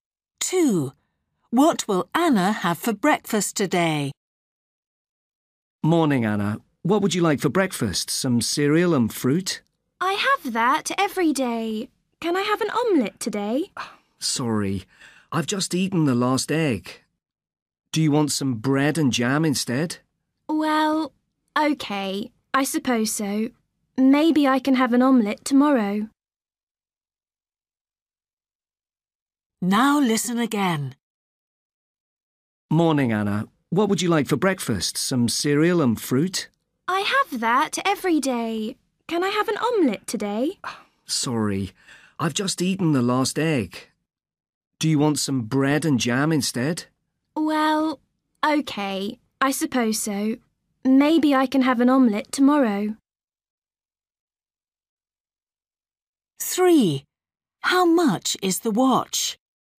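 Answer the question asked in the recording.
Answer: bread and jam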